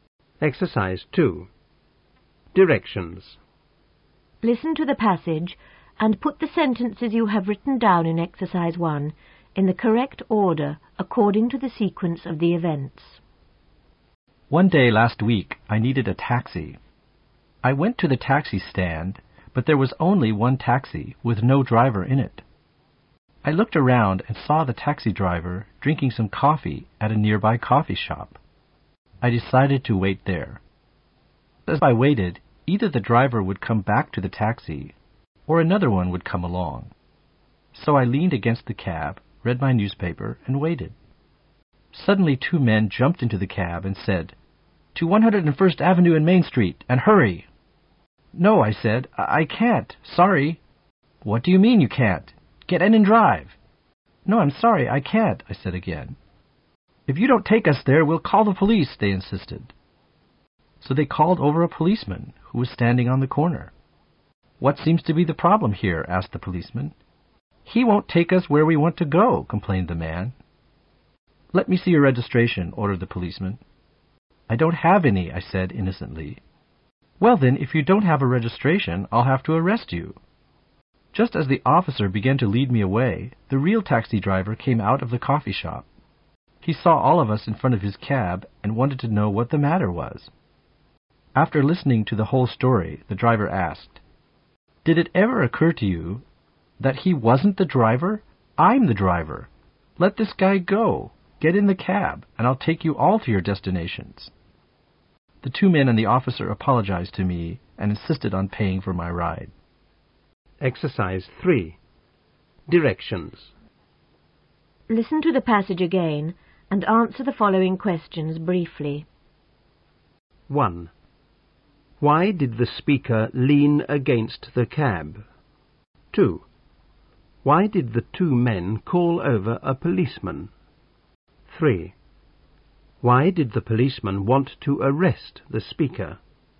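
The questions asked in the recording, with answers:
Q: Why did the speaker lean against the cab?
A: He was waiting for the driver or another taxi

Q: Why did the 2 men call over a policeman?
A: He wouldn't take them where they wanted to go

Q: Why did the policeman want to arrest the speaker?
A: He had no registration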